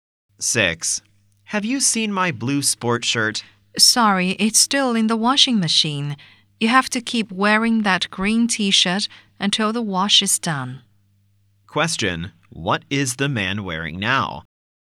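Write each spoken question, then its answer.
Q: What is the man wearing now?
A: A green T-shirt.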